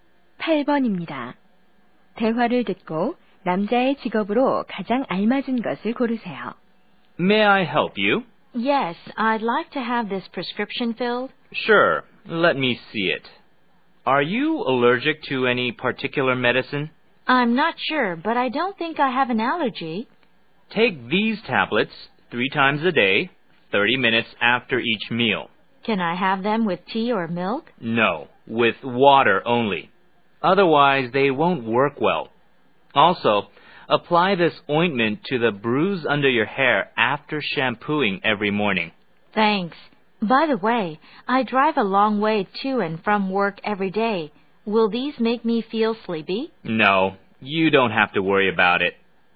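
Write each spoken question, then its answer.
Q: 대화를 듣고 남자의 직업으로 가장 알맞은 것을 고르세요.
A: 약사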